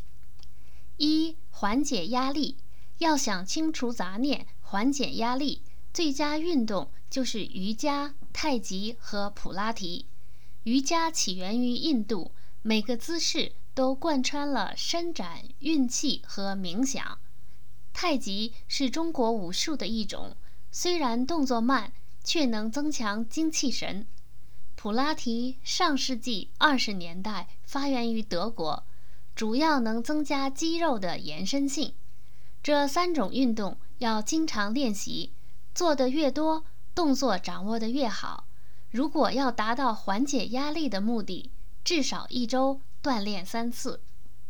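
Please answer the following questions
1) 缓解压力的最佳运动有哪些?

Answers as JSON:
{"1": "瑜伽、太极和普拉提"}

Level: 3rd Year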